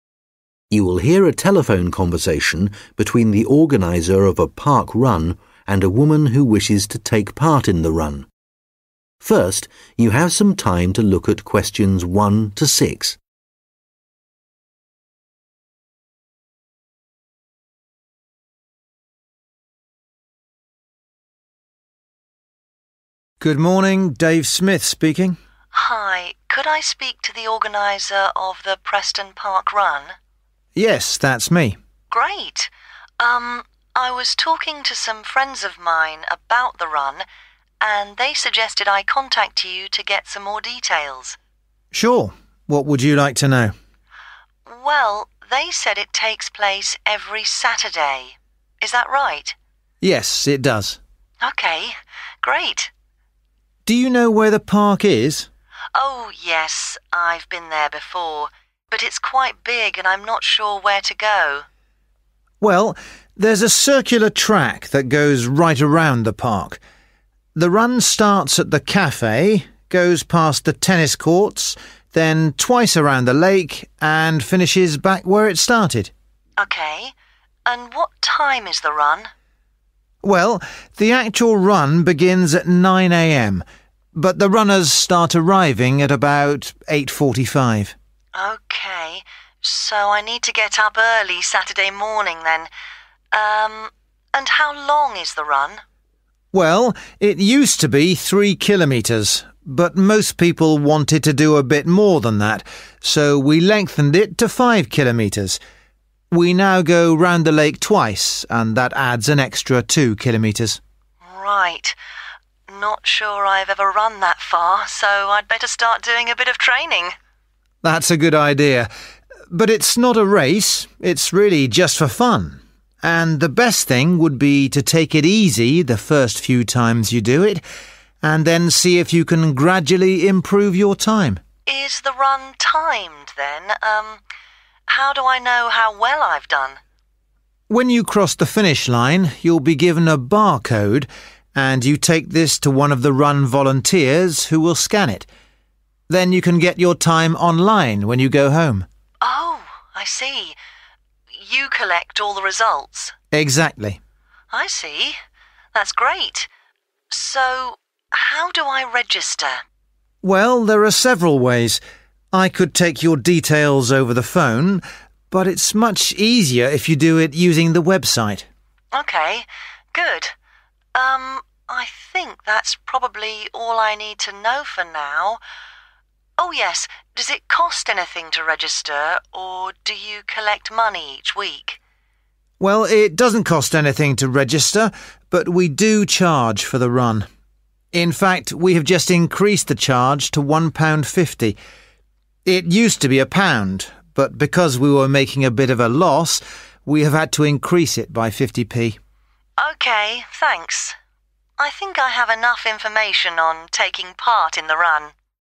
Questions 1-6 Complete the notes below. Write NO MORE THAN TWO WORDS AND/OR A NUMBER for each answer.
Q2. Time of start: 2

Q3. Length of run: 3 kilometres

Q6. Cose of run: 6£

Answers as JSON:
{"2": "9", "3": "5", "6": "1.50"}

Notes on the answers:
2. Well the actual run begins at 9 am but the runners start arriving at about 8.45 (Chà, cuộc chạy thực tế bắt đầu lúc 9 giờ sáng nhưng các vận động viên bắt đầu đến vào khoảng 8 giờ 45 phút)
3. Well it used to be three kilometers but most people wanted to do a bit more than that so we lengthened it to five kilometers – we now go round the lake twice and that adds an extra two kilometers. (Trước đây từng là 3km nhưng hầu hết mọi người muốn chạy nhiều hơn thế nên chúng tôi kéo dài nó thành 5km – bây giờ chúng ta đi vòng quanh hồ hai lần và như vậy thêm 2km nữa).